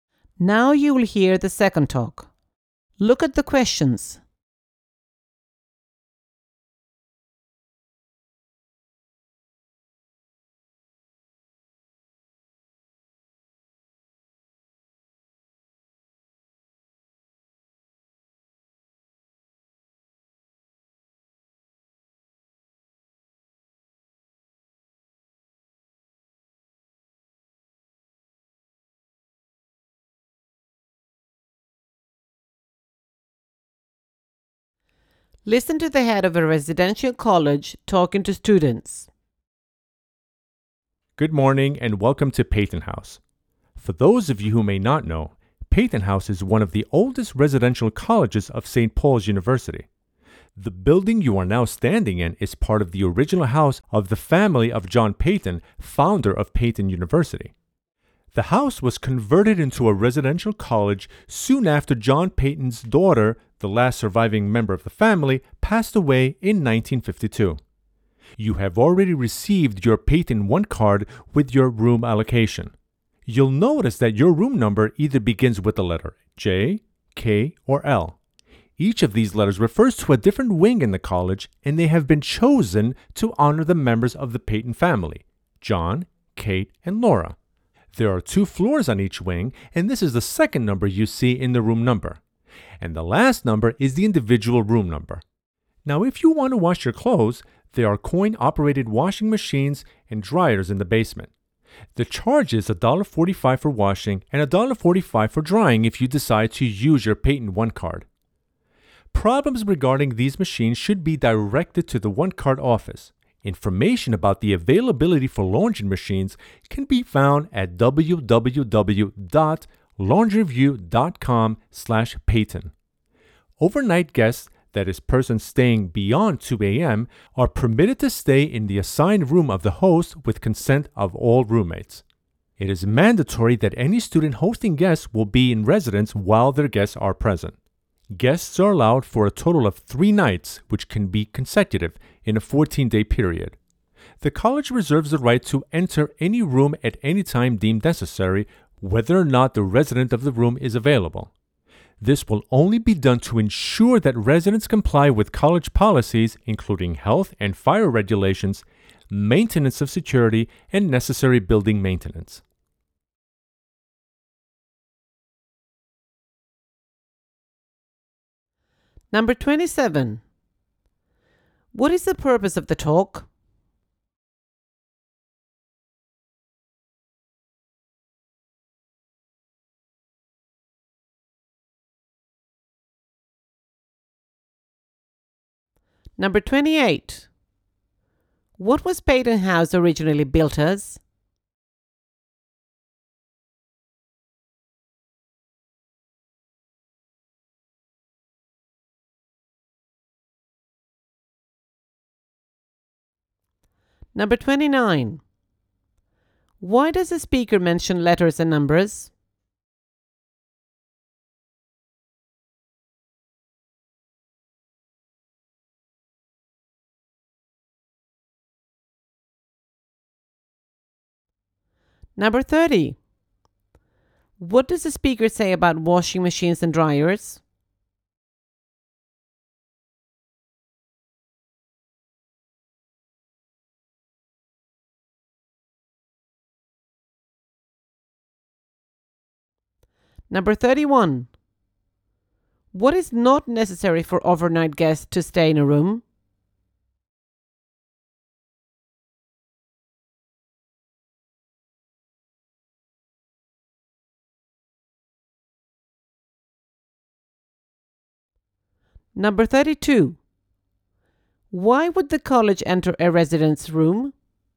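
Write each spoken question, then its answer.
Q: What is the purpose of the talk?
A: To welcome new residents and explain the college's facilities and rules

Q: What was Peyton House originally built as?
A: The family home of John Peyton

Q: Why does the speaker mention letters and numbers?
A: To explain how room numbers work (wing, floor, room)

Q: What does the speaker say about washing machines and dryers?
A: They are coin-operated, in the basement, and cost $1.45 per wash or dry with the card

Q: Why would the college enter a residence room?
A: To make sure residents follow college policies, such as health, fire, security and maintenance rules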